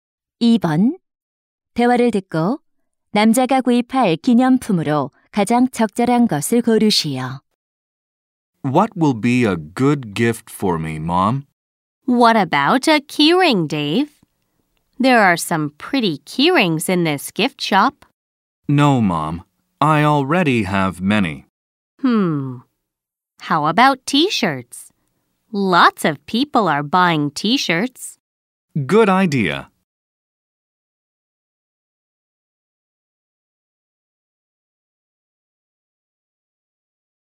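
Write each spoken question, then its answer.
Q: 대화를 듣고 남자가 구입할 기념품으로 가장 적절한 것을 고르시오.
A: 티셔츠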